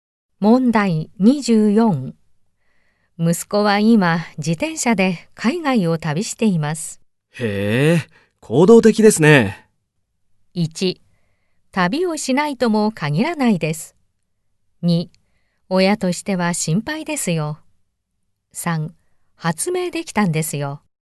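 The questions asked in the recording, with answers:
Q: 息子は今自転車で海外を旅しています。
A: 2: 親としては心配ですよ。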